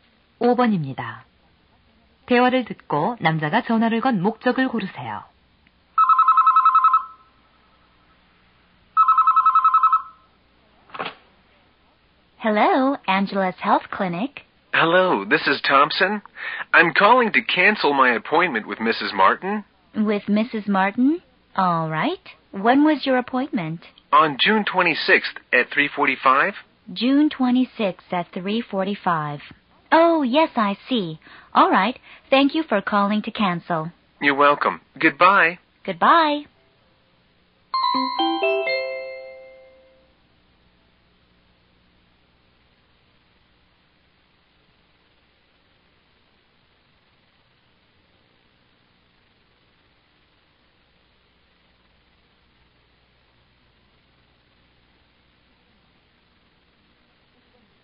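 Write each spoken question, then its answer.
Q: 대화를 듣고 남자가 전화를 건 목적을 고르세요.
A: 진료 예약 취소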